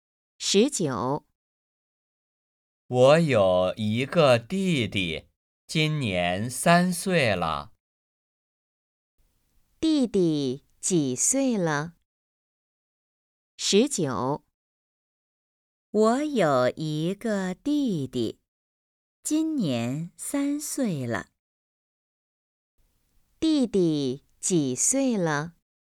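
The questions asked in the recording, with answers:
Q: 弟弟几岁了?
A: 3岁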